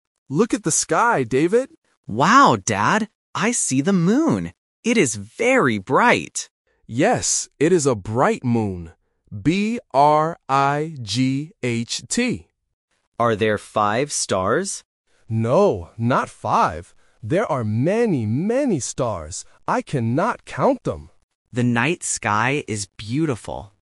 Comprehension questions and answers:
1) What does the boy see first?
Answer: The moon

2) How do they describe the moon?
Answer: Bright

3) How many stars are there?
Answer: Many

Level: A1